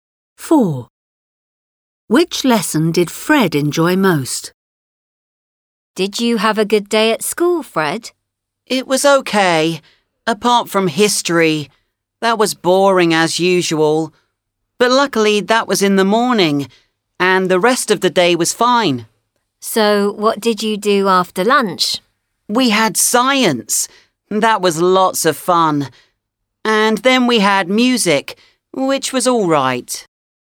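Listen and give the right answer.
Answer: Science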